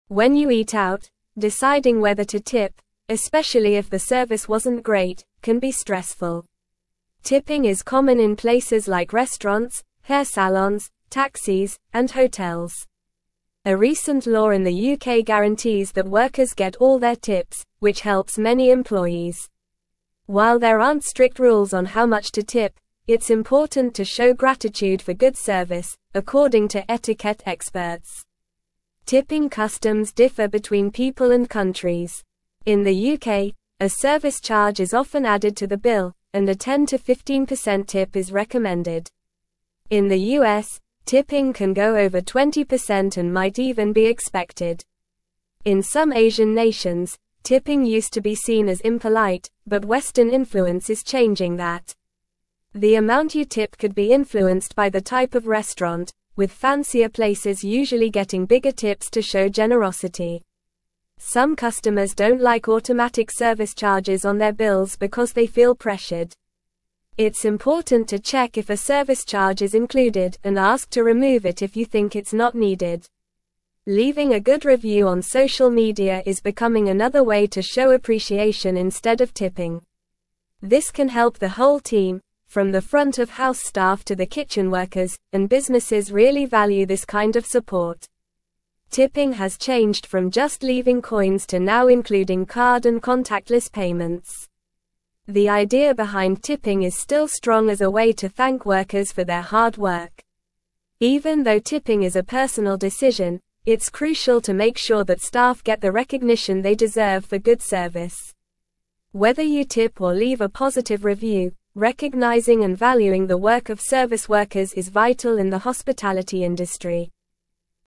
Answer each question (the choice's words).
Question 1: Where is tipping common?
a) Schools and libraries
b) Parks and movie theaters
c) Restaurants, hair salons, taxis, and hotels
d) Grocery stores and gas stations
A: Restaurants, hair salons, taxis, and hotels

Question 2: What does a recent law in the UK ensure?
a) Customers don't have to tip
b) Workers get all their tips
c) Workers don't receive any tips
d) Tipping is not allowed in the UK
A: Workers get all their tips

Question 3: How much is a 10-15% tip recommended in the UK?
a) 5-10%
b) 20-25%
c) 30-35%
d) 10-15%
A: 10-15%

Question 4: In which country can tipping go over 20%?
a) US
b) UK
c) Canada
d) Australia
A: US

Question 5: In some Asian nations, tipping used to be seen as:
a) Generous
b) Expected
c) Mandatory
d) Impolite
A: Impolite

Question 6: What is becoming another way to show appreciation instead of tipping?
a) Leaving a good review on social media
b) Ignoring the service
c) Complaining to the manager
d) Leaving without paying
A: Leaving a good review on social media

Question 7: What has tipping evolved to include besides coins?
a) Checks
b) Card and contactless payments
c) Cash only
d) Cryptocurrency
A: Card and contactless payments

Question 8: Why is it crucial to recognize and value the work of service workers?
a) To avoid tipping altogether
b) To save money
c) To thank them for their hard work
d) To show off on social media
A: To thank them for their hard work

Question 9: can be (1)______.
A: stressful

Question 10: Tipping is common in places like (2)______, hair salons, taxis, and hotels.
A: restaurants

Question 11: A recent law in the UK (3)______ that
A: guarantees

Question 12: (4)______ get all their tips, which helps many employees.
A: workers

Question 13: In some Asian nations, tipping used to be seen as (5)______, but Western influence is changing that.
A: impolite

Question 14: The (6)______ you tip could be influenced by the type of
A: amount

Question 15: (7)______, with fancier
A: restaurant

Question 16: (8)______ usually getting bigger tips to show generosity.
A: places

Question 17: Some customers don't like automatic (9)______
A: service

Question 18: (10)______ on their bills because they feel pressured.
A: charges

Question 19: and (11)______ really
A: businesses

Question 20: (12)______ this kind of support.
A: value

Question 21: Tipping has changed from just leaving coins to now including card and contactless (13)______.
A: payments

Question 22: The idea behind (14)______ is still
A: tipping

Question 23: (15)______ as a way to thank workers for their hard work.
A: strong

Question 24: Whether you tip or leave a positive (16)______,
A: review

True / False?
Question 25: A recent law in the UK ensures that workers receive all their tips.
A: True

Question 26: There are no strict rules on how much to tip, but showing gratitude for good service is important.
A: True

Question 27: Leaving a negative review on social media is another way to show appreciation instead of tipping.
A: False

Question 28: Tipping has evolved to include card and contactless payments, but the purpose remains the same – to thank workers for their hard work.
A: True

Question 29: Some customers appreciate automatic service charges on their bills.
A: False

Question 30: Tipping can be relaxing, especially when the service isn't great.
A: False

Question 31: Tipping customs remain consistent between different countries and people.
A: False

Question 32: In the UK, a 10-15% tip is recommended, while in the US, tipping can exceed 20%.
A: True

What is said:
When you eat out, deciding whether to tip, especially if the service wasn't great, can be stressful. Tipping is common in places like restaurants, hair salons, taxis, and hotels. A recent law in the UK guarantees that workers get all their tips, which helps many employees. While there aren't strict rules on how much to tip, it's important to show gratitude for good service, according to etiquette experts.
Tipping customs differ between people and countries. In the UK, a service charge is often added to the bill, and a 10-15% tip is recommended. In the US, tipping can go over 20% and might even be expected. In some Asian nations, tipping used to be seen as impolite, but Western influence is changing that. The amount you tip could be influenced by the type of restaurant, with fancier places usually getting bigger tips to show generosity.
Some customers don't like automatic service charges on their bills because they feel pressured. It's important to check if a service charge is included and ask to remove it if you think it's not needed. Leaving a good review on social media is becoming another way to show appreciation instead of tipping. This can help the whole team, from the front-of-house staff to the kitchen workers, and businesses really value this kind of support.
Tipping has changed from just leaving coins to now including card and contactless payments. The idea behind tipping is still strong as a way to thank workers for their hard work. Even though tipping is a personal decision, it's crucial to make sure that staff get the recognition they deserve for good service. Whether you tip or leave a positive review, recognizing and valuing the work of service workers is vital in the hospitality industry.

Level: Level 3